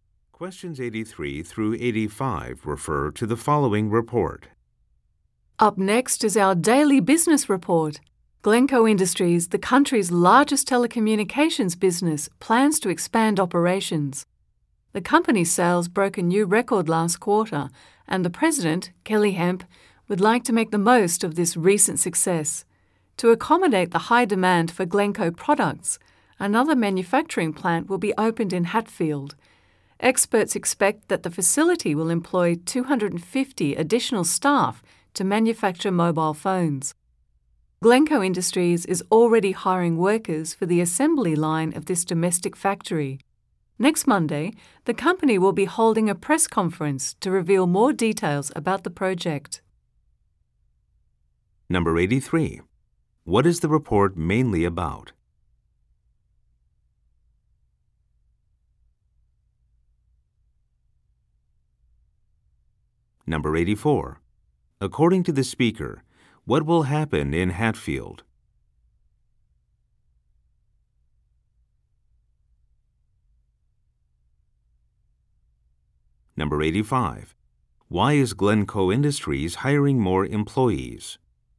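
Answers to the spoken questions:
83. Glencoe Industries' expansion plans
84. A new manufacturing plant will open
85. To meet high demand for its products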